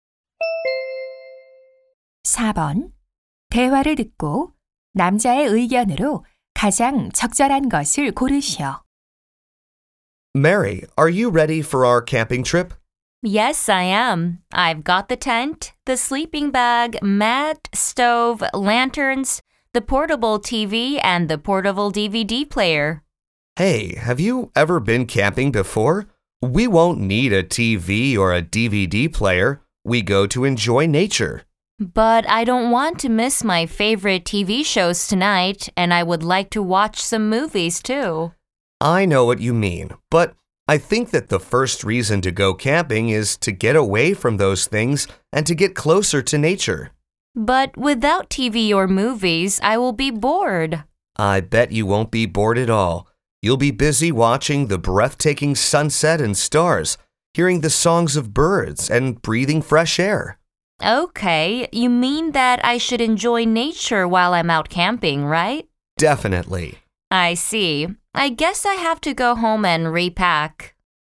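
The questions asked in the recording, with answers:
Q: 대화를 듣고 남자의 의견으로 가장 적절한 것을 고르시오.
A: 캠핑에서는 전자기기 없이 자연을 즐겨야 한다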